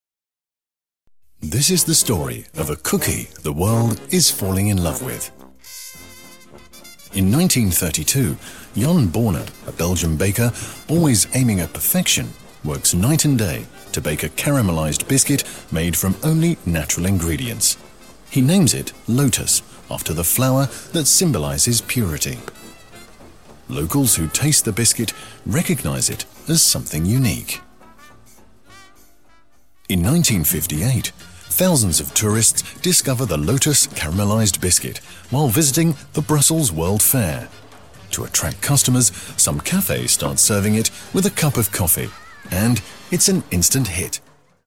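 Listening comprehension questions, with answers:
You will hear a story about Lotus biscuits. The recording is divided into two sections. You can listen once all the way through, and then listen again to both sections separately. Read the questions carefully and answer them in Finnish.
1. Miksi keksi nimettiin puhtautta symboloivan lootuskukan mukaan?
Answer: Leipuri tavoitteli täydellisyyttä ja keksi tehtiin vain luonnollisista ainesosista.

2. Miksi vuosi 1958 oli keksin kannalta merkittävä?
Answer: Tuhannet turistit löysivät keksin Brysselin maailmannäyttelyssä.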